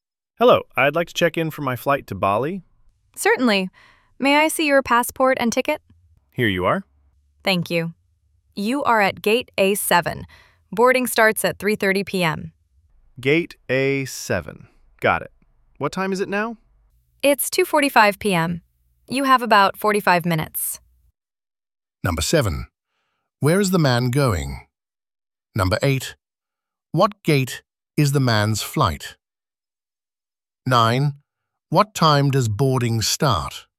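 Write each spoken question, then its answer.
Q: Where is the man going?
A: Bali

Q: What gate is the man's flight?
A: Gate A7

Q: What time does boarding start?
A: 3:30 p.m.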